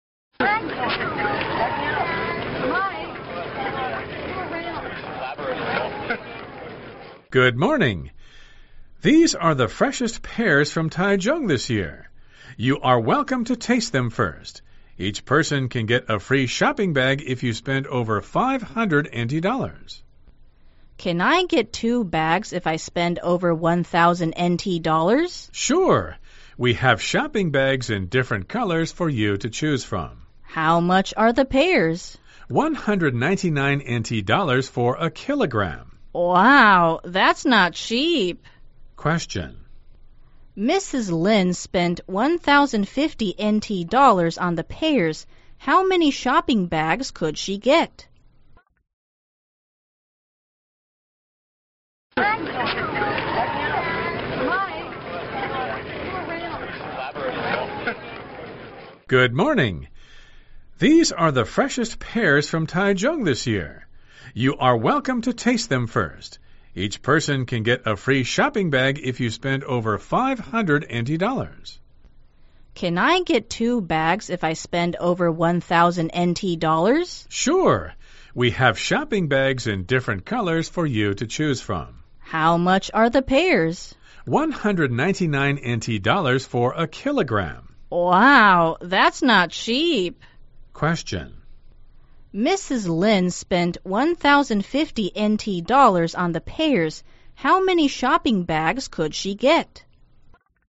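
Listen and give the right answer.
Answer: Two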